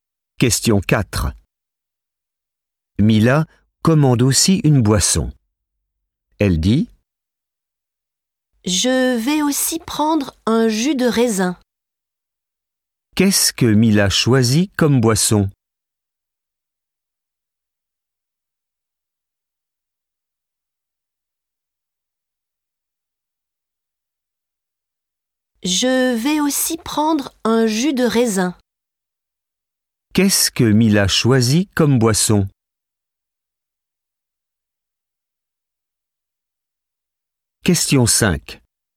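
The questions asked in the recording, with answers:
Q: Qu'est-ce que Mila choisit comme boisson?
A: Un jus de raisin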